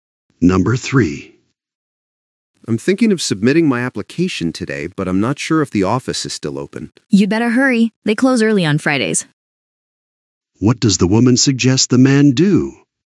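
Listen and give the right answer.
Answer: Hurry to submit the application, as the office closes early on Fridays.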